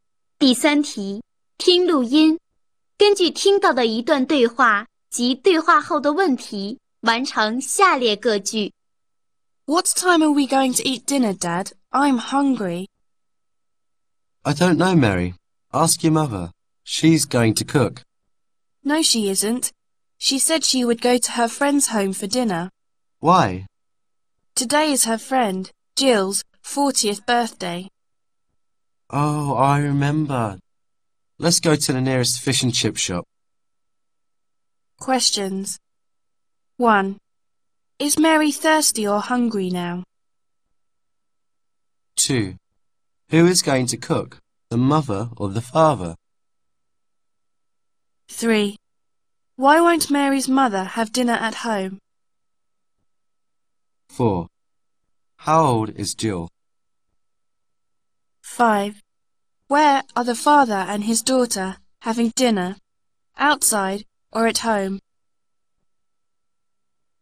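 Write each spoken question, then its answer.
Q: Is Mary thirsty or hungry now?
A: Hungry

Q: Why won't Mary's mother have dinner at home?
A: It is her friend Jill's 40th birthday, so she is having dinner at Jill's home

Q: How old is Jill?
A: 40

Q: Where are the father and his daughter having dinner? Outside or at home?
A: Outside, at the nearest fish and chip shop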